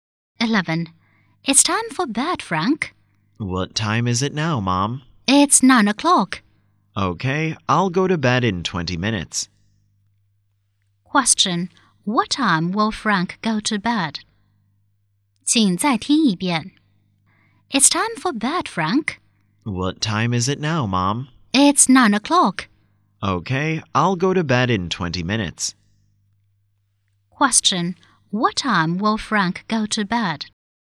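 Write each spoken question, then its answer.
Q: What time will Frank go to bed?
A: At 9:20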